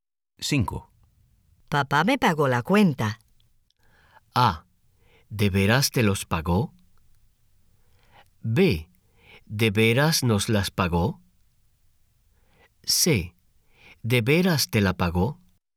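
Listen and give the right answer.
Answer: C: ¿De veras te la pagó?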